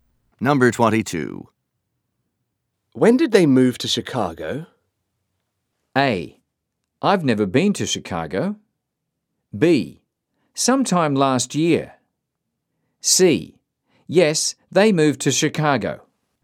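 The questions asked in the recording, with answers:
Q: When did they move to Chicago?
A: B: Sometime last year.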